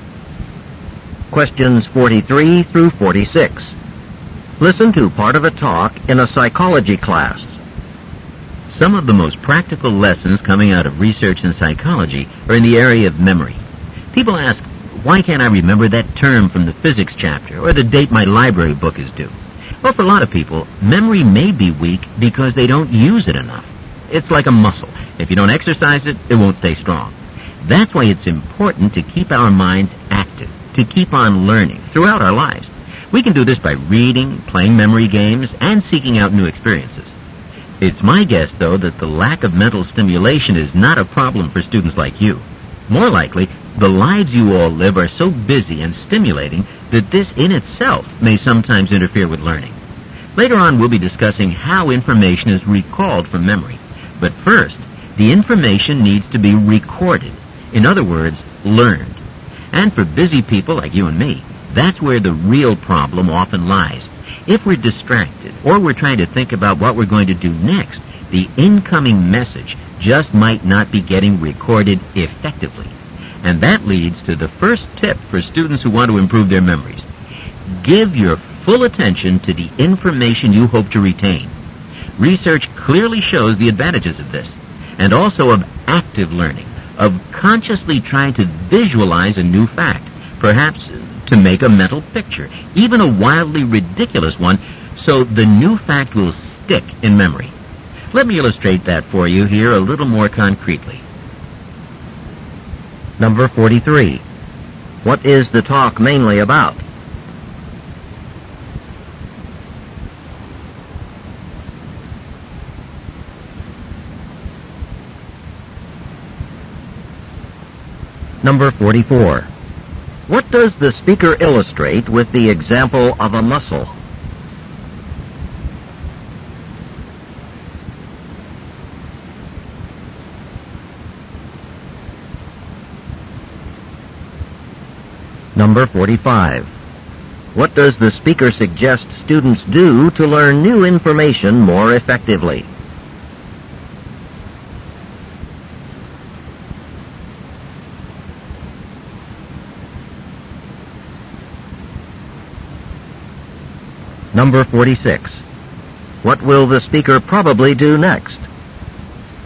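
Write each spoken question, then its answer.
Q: What is the talk mainly about?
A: Ways to improve memory

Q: What does the speaker illustrate with the example of a muscle?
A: Memory weakens if it isn't used.

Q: What does the speaker suggest students do to learn new information more effectively?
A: Pay full attention and visualize the information.

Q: What will the speaker probably do next?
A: Give a concrete example of visualizing a fact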